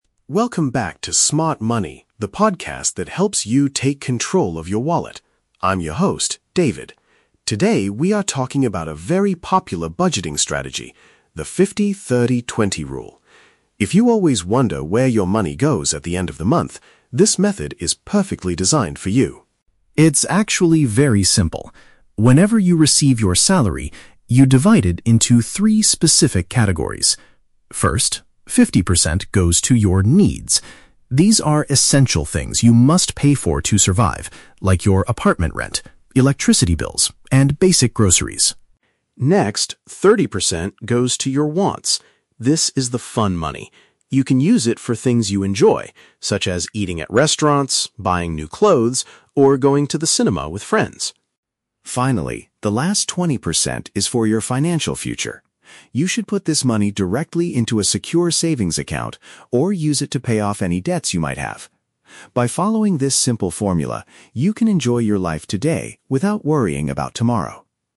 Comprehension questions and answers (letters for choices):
Listen to the introduction of a financial podcast. For each question, choose the correct answer (A, B, or C).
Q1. Who is this specific budgeting method mainly designed for?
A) People who earn a very high monthly salary.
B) Listeners who struggle to track their monthly spending.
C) Students who need to borrow money for their education.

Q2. According to the host, what should the fifty percent category be used for?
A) Crucial living expenses that you cannot avoid paying.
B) Enjoyable activities like dining out and watching movies.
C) Putting cash into a secure bank account for the future.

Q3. What should listeners do with the final twenty percent of their income?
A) Spend it all on luxury clothing and entertainment.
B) Reduce their current loans or build up their savings.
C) Donate it to charities to help people in need.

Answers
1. B
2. A
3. B

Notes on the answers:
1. David says, "If you always wonder where your money goes at the end of the month, this method is perfectly designed for you." Wondering where your money goes means you struggle to track your spending. Option (A) is a trap; the rule applies to any salary, not just high ones. Option (C) is a trap; borrowing money is not the purpose of the podcast.
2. The 50% is for 'needs', which David describes as "essential things you must pay for to survive" (crucial living expenses you cannot avoid). Option (B) is a trap; this describes the 30% category ('wants'). Option (C) is a trap; this describes the 20% category (savings).
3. The host states the final 20% should be put "into a secure savings account or use it to pay off any debts" (reduce loans or build up savings). Option (A) is a trap; this belongs to the 30% category. Option (C) is a noble act, but it is not mentioned in this budgeting rule.

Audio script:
David: Welcome back to 'Smart Money,' the podcast that helps you take control of your wallet. I'm your host, David. Today, we are talking about a very popular budgeting strategy: the 50/30/20 rule. If you always wonder where your money goes at the end of the month, this method is perfectly designed for you.
It's actually very simple. Whenever you receive your salary, you divide it into three specific categories. First, fifty percent goes to your 'needs'. These are essential things you must pay for to survive, like your apartment rent, electricity bills, and basic groceries.
Next, thirty percent goes to your 'wants'. This is the fun money. You can use it for things you enjoy, such as eating at restaurants, buying new clothes, or going to the cinema with friends.
Finally, the last twenty percent is for your financial future. You should put this money directly into a secure savings account or use it to pay off any debts you might have. By following this simple formula, you can enjoy your life today without worrying about tomorrow.